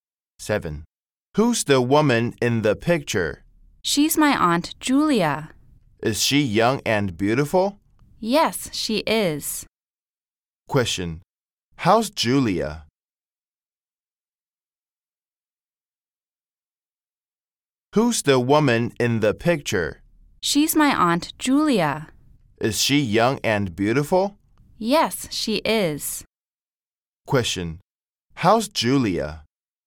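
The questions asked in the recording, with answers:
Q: Question. How's Julia?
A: Young and beautiful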